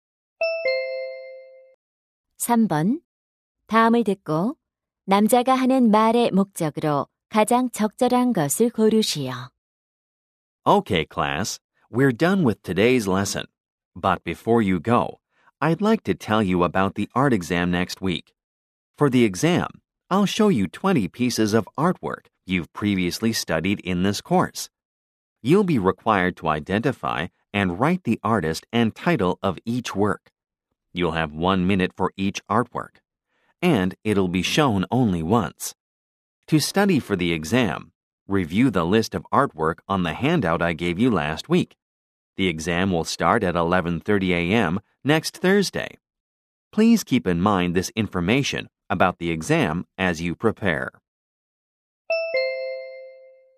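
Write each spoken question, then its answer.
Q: 다음을 듣고 남자가 하는 말의 목적으로 가장 적절한 것을 고르시오.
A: 다음 주 미술 시험에 대해 안내하려고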